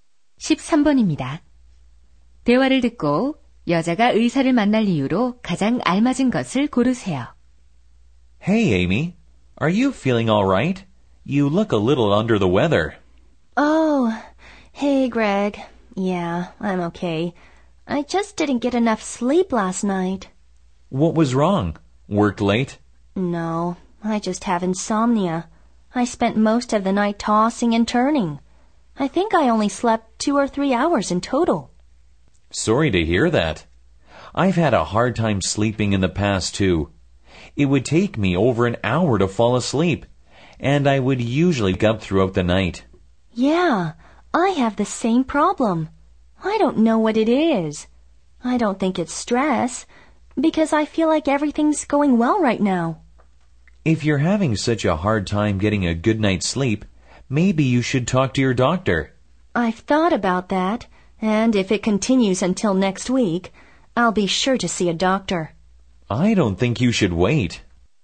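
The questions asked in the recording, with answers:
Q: 대화를 듣고 여자가 의사를 만날 이유로 가장 알맞은 것을 고르세요.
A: 불면증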